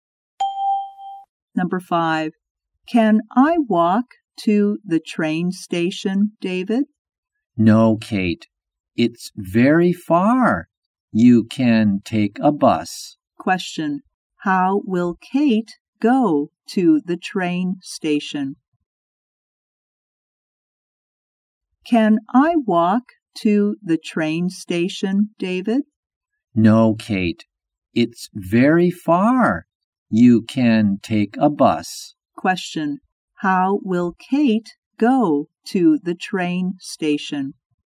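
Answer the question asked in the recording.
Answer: By bus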